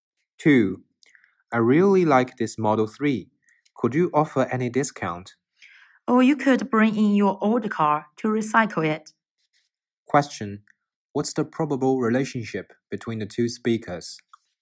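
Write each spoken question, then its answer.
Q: What's the probable relationship between the two speakers?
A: Customer and car salesperson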